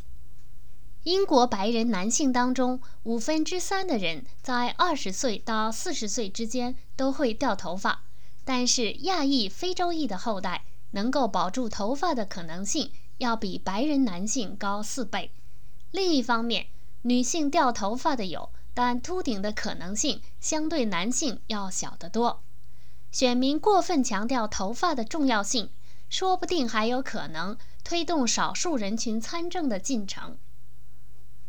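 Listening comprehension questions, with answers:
Please answer the following questions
为什么说选民过分注意领导人的头发可能会推进少数人群参政的进程?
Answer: 因为亚裔、非洲裔男性保住头发的可能性比白人男性高4倍,女性秃顶的可能性也比男性小得多

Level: 3rd Year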